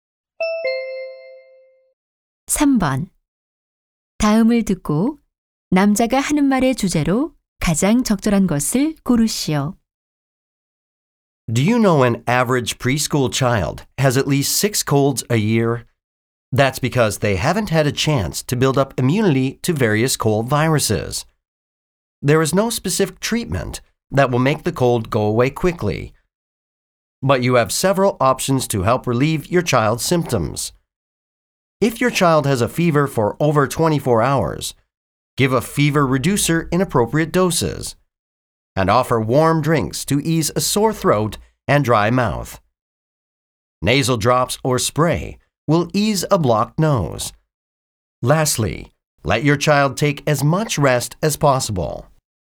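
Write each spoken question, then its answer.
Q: 다음을 듣고 남자가 하는 말의 주제로 가장 적절한 것을 고르시오.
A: 아이의 감기 증상을 완화하는 방법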